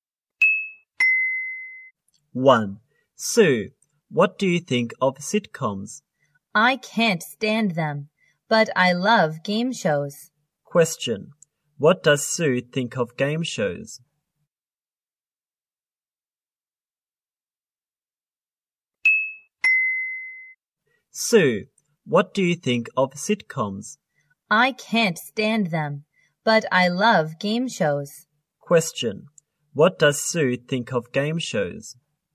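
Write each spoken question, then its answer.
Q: What does Sue think of game shows?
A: She loves them.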